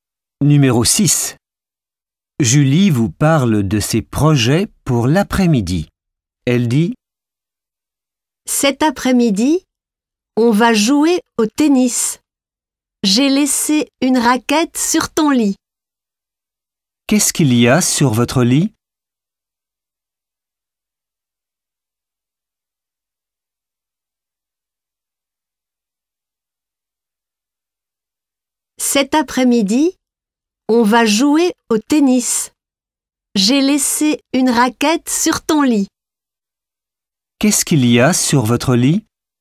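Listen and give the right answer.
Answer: Une raquette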